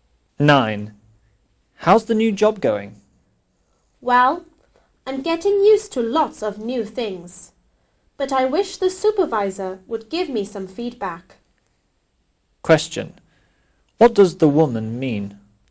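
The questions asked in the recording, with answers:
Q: What does the woman mean?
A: She wants feedback from her supervisor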